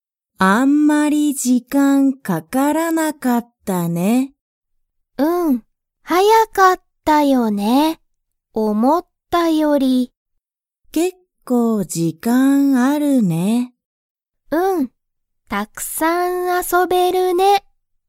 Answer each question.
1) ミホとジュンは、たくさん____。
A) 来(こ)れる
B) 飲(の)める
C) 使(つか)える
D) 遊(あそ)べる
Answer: D

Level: Level 1

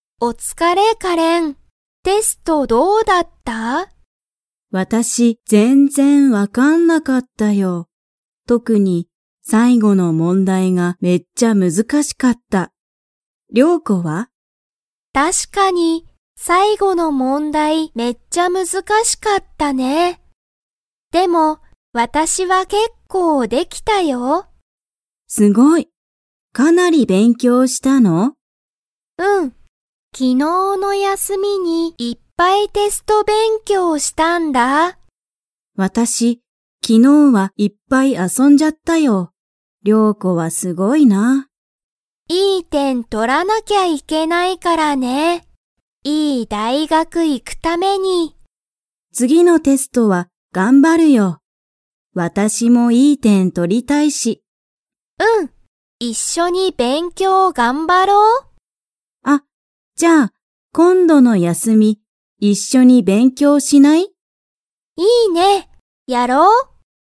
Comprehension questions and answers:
Comprehension Quiz (Skip if you don't understand the conversation yet)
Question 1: 特(とく)に、最後(さいご)の問題(もんだい)がめっちゃ____。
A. 難(むずか)しかった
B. すごかった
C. よかった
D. かわいかった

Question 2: カレンとリョウコは、今度(こんど)の休(やす)みに一緒(いっしょ)に勉強(べんきょう)しますか?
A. はい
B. いいえ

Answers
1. A
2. A

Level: Level 2

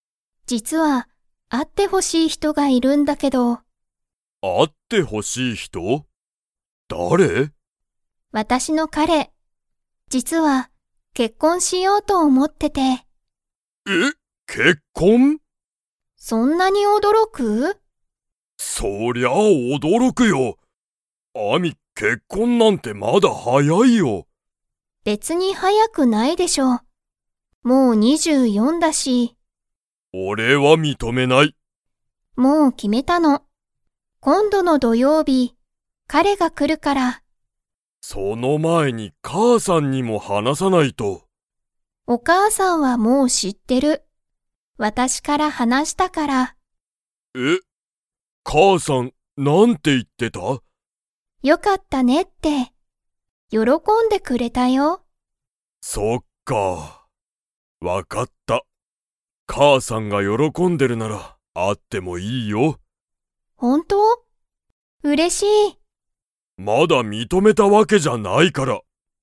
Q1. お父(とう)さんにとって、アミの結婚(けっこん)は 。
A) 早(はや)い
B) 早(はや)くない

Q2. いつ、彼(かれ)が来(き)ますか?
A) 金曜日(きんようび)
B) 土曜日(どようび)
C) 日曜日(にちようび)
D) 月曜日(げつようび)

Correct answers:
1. A
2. B

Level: Level 3

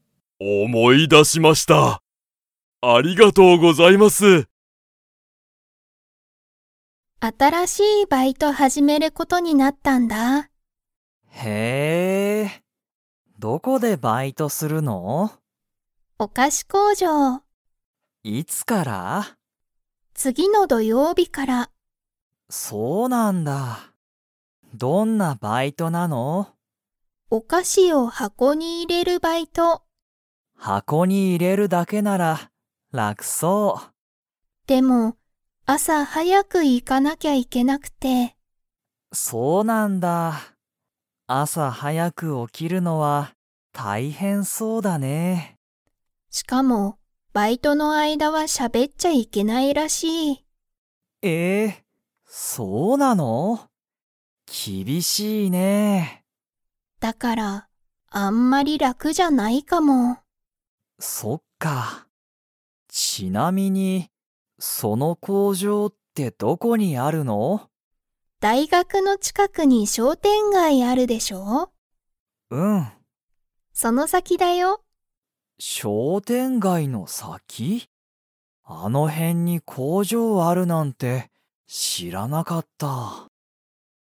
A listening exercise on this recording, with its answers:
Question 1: ユリは、お菓子かしを に入いれるバイトを始はじめる。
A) 工場こうじょう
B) バッグ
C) 箱はこ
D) 商店街しょうてんがい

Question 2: バイトの間あいだは、喋しゃべれますか?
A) はい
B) いいえ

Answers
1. C
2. B

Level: Level 4

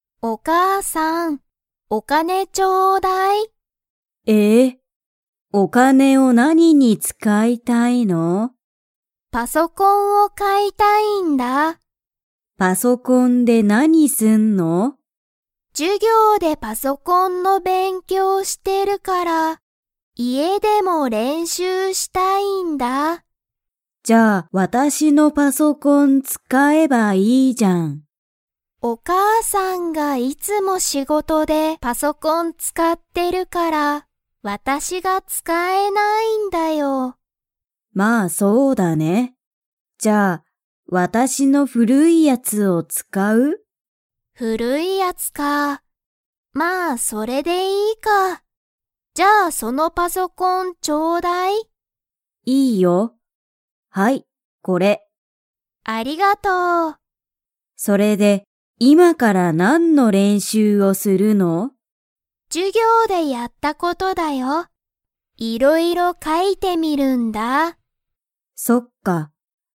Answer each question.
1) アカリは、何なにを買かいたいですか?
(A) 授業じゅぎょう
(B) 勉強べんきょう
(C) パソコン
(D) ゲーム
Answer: C

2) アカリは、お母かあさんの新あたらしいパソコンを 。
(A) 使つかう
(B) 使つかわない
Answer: B

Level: Level 3

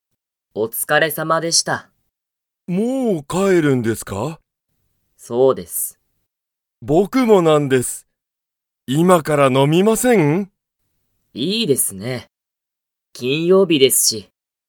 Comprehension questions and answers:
Comprehension Quiz (Skip if you don't understand the conversation yet)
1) 佐藤さとうさんと山田やまださんは、今いまから飲のみますか?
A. はい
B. いいえ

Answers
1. A

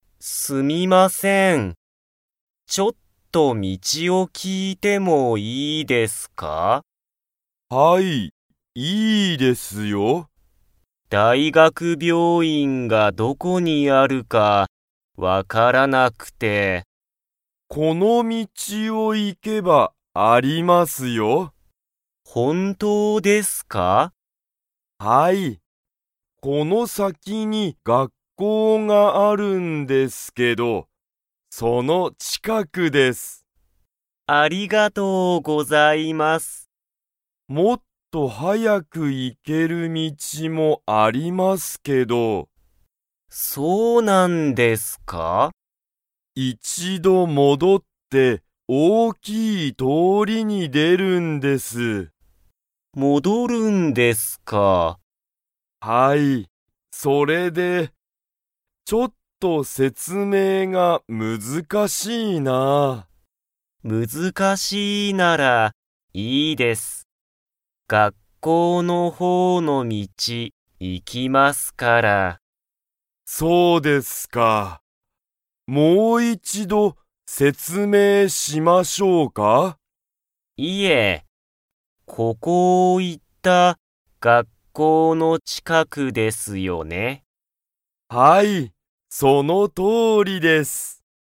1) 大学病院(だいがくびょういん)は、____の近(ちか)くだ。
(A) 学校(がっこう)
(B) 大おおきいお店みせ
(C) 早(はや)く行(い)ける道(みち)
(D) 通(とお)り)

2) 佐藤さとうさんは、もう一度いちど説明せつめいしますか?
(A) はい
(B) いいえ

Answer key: 1A, 2B

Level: Level 2

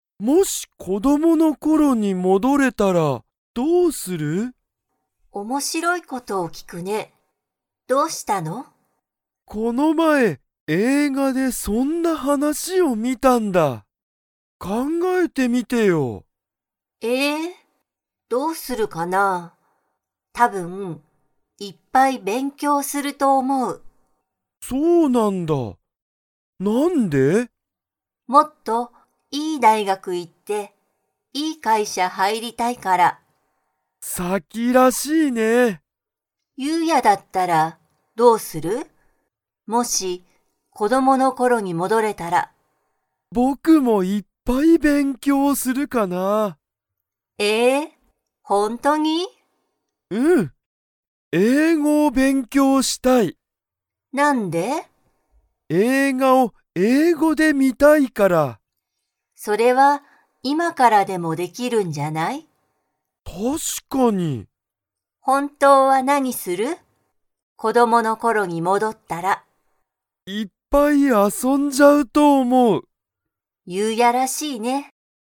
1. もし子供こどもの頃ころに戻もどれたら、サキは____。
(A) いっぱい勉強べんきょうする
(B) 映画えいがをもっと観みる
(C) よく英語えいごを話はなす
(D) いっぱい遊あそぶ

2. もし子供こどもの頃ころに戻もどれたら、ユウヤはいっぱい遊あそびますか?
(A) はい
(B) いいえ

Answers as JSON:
{"1": "A", "2": "A"}

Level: Level 2

